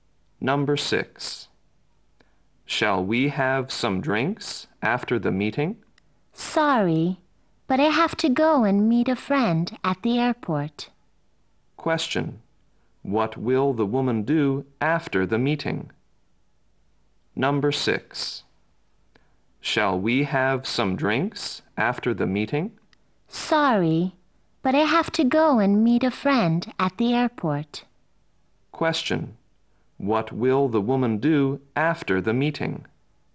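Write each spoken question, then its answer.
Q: What will the woman do after the meeting?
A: Go and meet a friend at the airport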